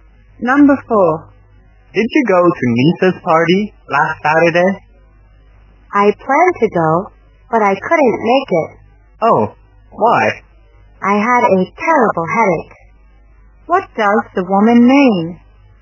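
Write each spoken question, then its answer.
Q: What does the woman mean?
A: She didn't go to the party because she had a terrible headache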